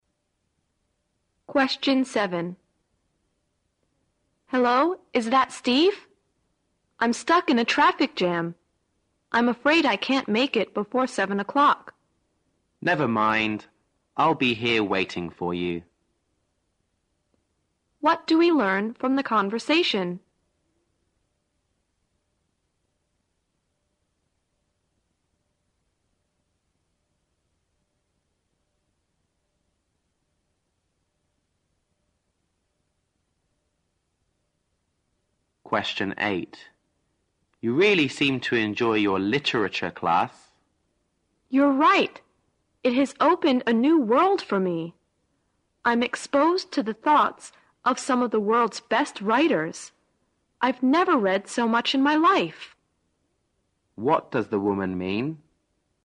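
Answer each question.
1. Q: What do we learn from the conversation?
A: The man and the woman have an appointment at 7 o'clock.

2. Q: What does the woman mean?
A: She's learned a lot from the literature class.

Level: 大学英语四级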